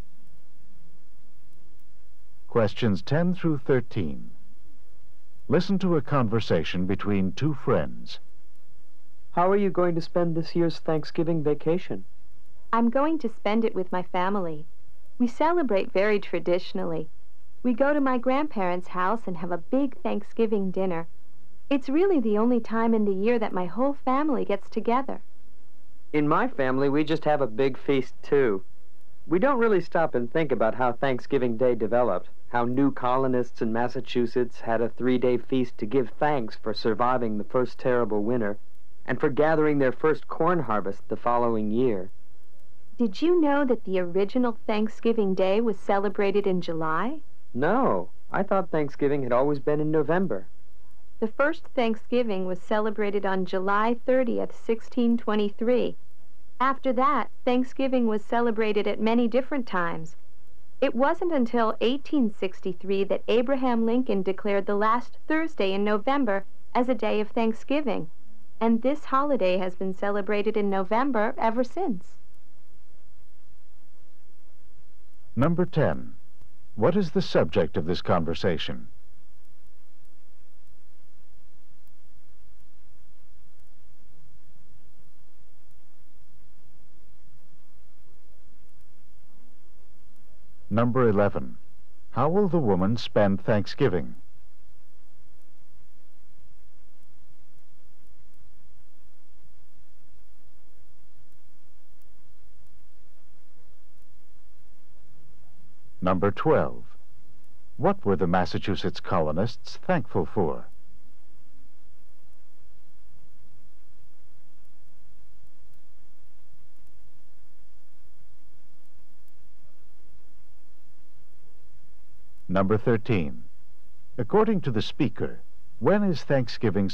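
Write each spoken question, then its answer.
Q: What is the subject of this conversation?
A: Thanksgiving and its history.

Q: What were the Massachusetts colonists thankful for?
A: Surviving the first winter and their first corn harvest.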